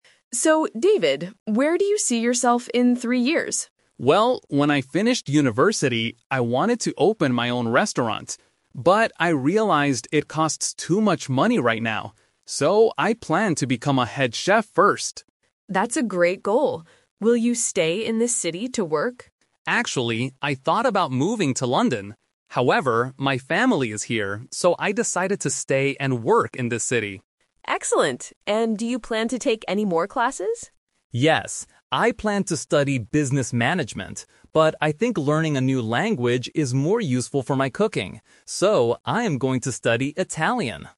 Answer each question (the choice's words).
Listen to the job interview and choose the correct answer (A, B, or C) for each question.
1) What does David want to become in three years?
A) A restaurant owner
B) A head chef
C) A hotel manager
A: A head chef

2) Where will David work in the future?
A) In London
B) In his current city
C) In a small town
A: In his current city

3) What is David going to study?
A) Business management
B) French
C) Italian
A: Italian

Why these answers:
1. David says he wanted to open his own restaurant (The Trap). However, he uses "But" to change his plan because it costs too much money. He uses "So" to state his real plan: "I plan to become a head chef first." A hotel manager is not mentioned.
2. David mentions that he thought about moving to London (The Trap). But he uses the word "However" to explain that his family is here. His final decision is to "stay and work in this city." A small town is not mentioned.
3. David says he planned to study business management (The Trap). He changes his mind because he thinks learning a language is more useful. He says, "I am going to study Italian." French is a language, but it is not mentioned in the audio.

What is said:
Interviewer: So, David, where do you see yourself in three years?
Candidate: Well, when I finished university, I wanted to open my own restaurant. But I realized it costs too much money right now. So, I plan to become a head chef first.
Interviewer: That's a great goal. Will you stay in this city to work?
Candidate: Actually, I thought about moving to London. However, my family is here, so I decided to stay and work in this city.
Interviewer: Excellent. And do you plan to take any more classes?
Candidate: Yes. I planned to study business management. But I think learning a new language is more useful for my cooking. So, I am going to study Italian.